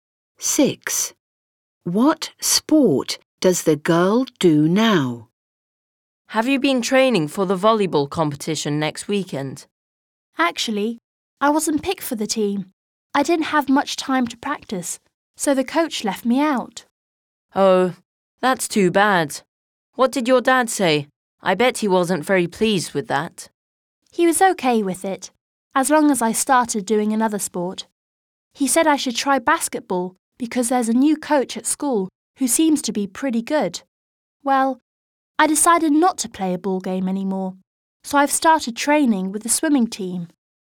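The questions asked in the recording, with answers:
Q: What sport does the girl do now?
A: Swimming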